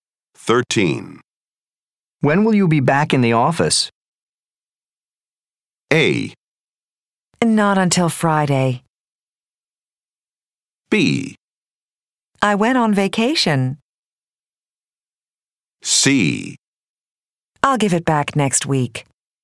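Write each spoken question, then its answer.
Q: When will you be back in the office?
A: A: Not until Friday.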